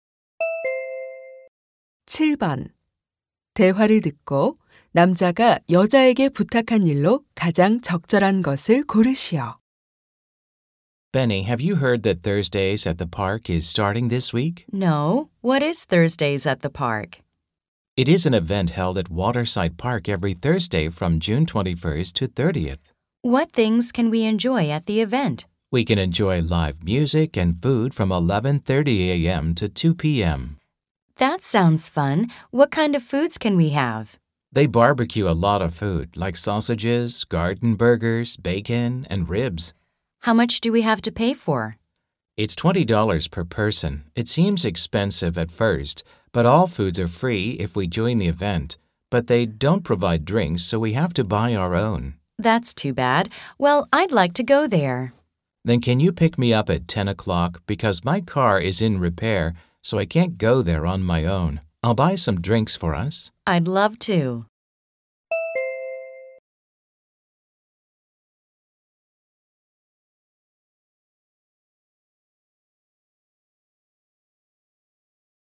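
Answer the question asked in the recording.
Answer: 10시에 차로 데리러 오기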